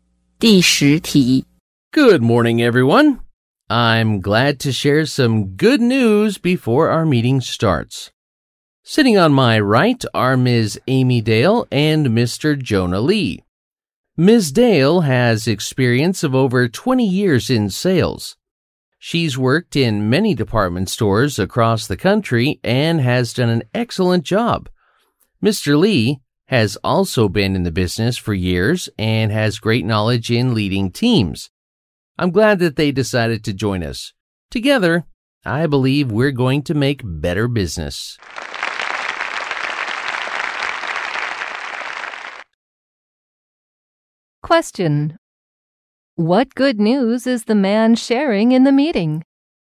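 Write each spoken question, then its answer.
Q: What good news is the man sharing in the meeting?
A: Two new experienced people are joining the company.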